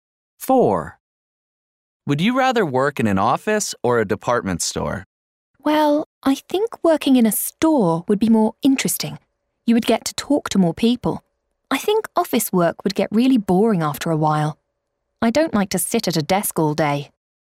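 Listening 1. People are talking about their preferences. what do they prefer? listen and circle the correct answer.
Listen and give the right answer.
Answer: a department store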